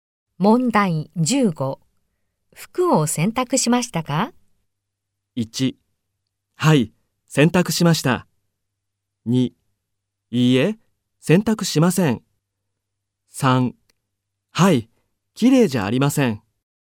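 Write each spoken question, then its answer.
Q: 服を洗濯しましたか?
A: 1: はい、洗濯しました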